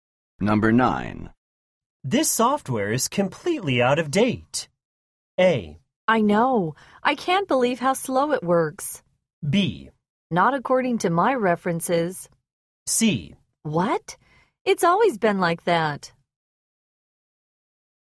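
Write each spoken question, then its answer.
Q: This software is completely out of date.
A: A: I know. I can't believe how slow it works.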